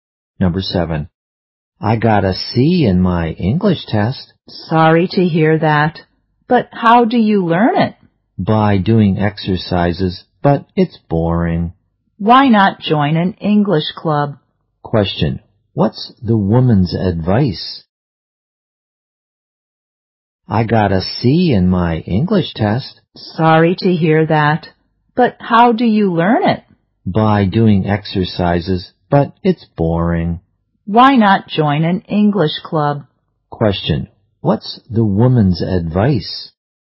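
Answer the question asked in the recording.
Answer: Join an English club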